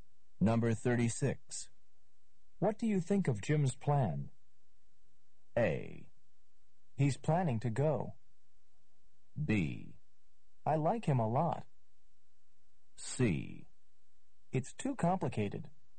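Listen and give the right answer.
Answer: C: It's too complicated.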